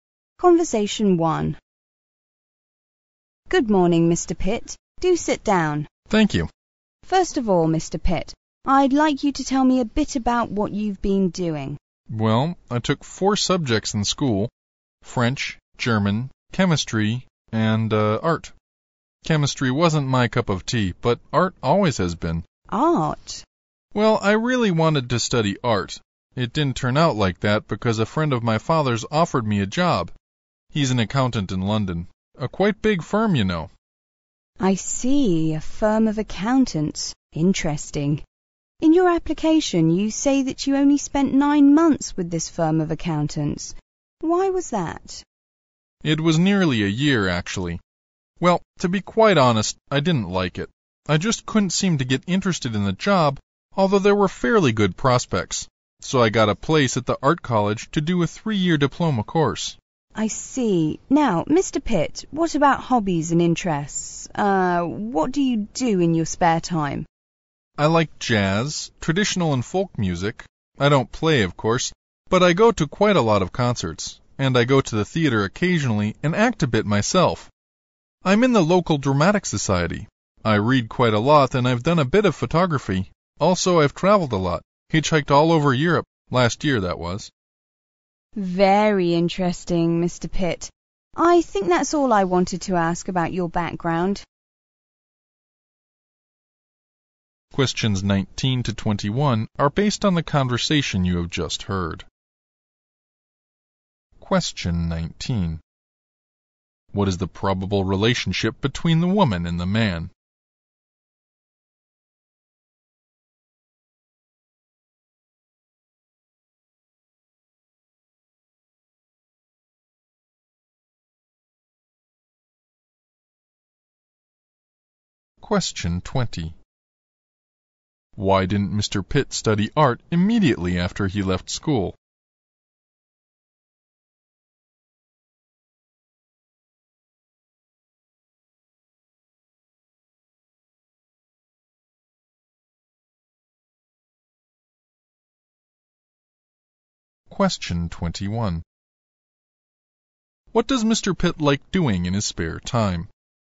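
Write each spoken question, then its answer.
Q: What is the probable relationship between the woman and the man?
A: Interviewer and job applicant

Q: Why didn't Mr. Pitt study art immediately after he left school?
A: A friend of his father's offered him a job at an accountant's firm

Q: What does Mr. Pitt like doing in his spare time?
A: Going to concerts and the theatre, acting, reading, photography and traveling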